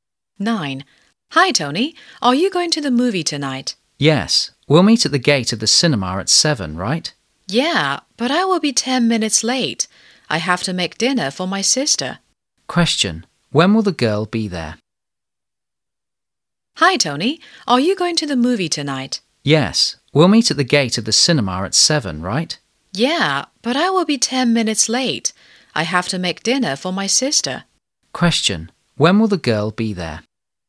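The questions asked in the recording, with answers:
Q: When will the girl be there?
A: At 7:10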